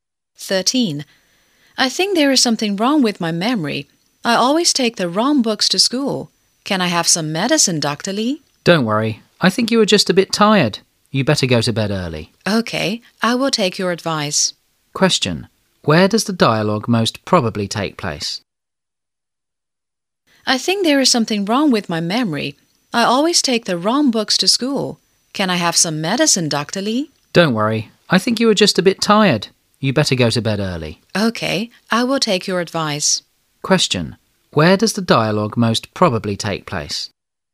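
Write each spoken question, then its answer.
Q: Question. Where does the dialogue most probably take place?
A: At a doctor's / in a clinic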